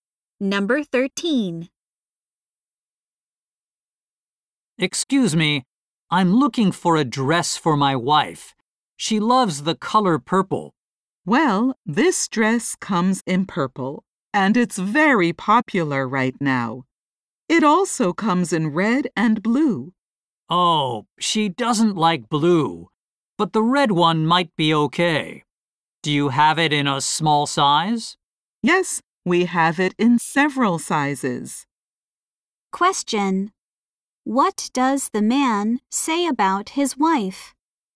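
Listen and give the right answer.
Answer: She loves purple (and doesn't like blue).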